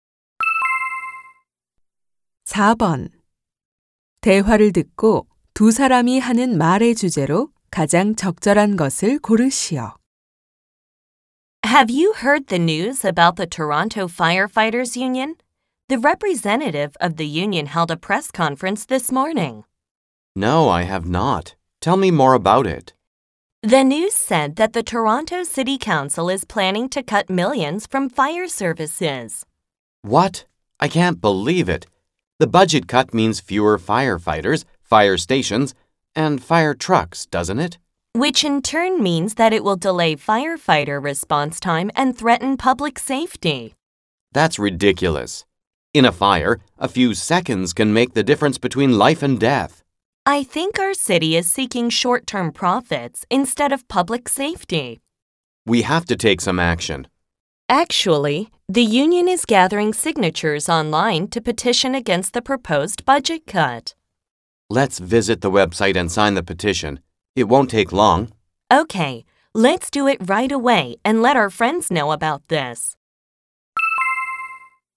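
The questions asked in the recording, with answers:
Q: 대화를 듣고 두 사람이 하는 말의 주제로 가장 적절한 것을 고르시오.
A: 소방 예산 삭감 반대 청원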